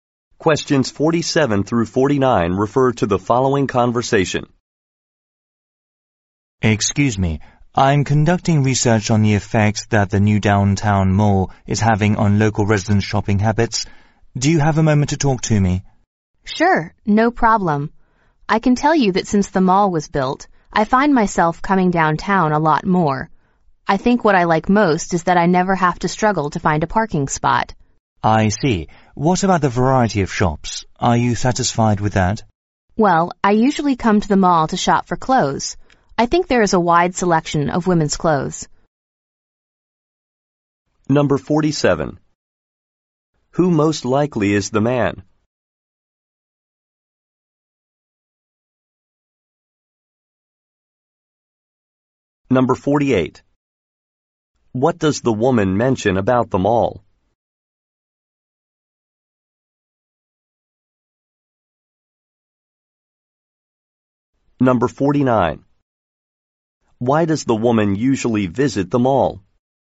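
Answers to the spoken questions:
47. A researcher
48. Parking is easy to find
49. To shop for clothes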